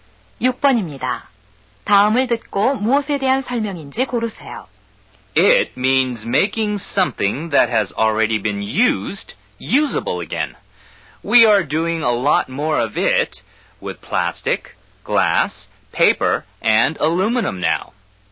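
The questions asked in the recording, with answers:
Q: 다음을 듣고 무엇에 대한 설명인지 고르세요.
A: 재활용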